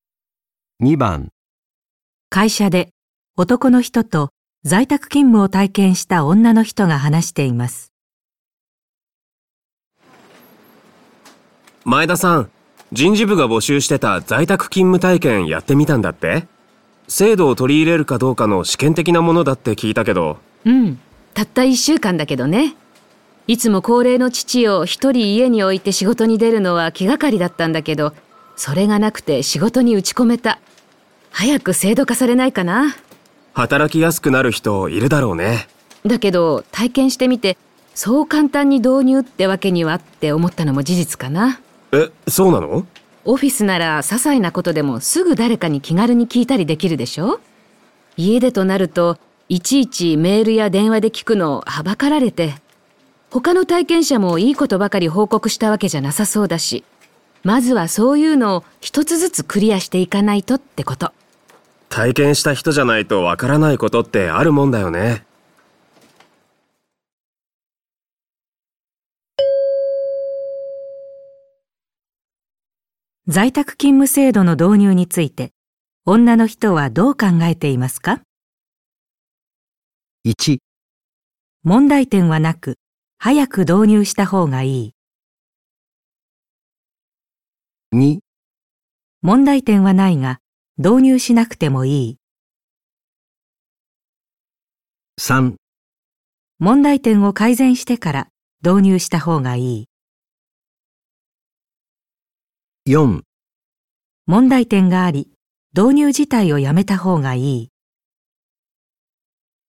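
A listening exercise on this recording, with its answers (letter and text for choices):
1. 在宅勤務制度の導入について、女の人はどう考えていますか。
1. 問題点はなく、早く導入した方がいい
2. 問題点はないが、導入しなくてもいい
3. 問題点を改善してから導入したほうがいい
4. 問題点があり、導入自体をやめた方がいい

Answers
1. 3. 問題点を改善してから導入したほうがいい

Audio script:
早く制度化されないかな。 男:働きやすくなる人いるだろうね。
女:だけど体験してみて、そう簡単に導入ってわけにはって思ったのも事実かな。
男:え、そうなの?
女:オフィスなら些細なことでもすぐ誰かに気軽に聞いたりできるでしょ?家でとなると、いちいちメールや電話で聞くの憚られて、他の体験者もいいことばかり報告したわけじゃなさそうだし。まずはそういうのを1つずつクリアしていかないとってこと。
男:体験した人じゃないとわからないことってあるもんだよね。

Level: N1级别听力题库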